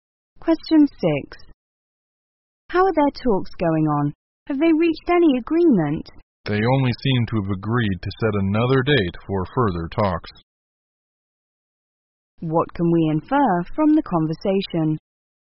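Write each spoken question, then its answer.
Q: What can we infer from the conversation?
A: The talks made little progress; they only agreed to meet again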